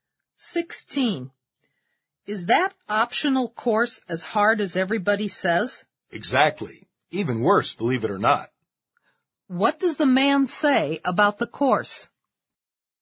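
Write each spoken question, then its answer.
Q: What does the man say about the course?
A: It is even harder than everybody says.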